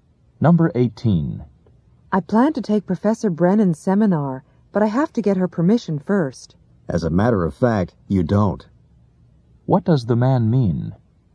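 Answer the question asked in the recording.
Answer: The woman doesn't need the professor's permission.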